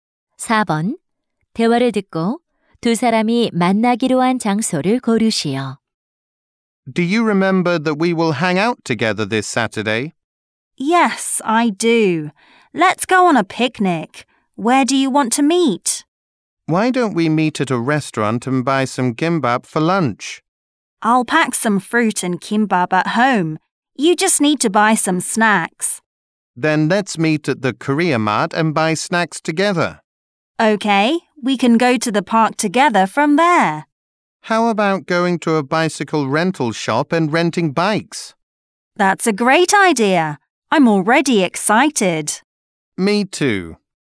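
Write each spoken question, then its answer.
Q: 대화를 듣고 두 사람이 만나기로 한 장소를 고르시오.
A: Korea Mart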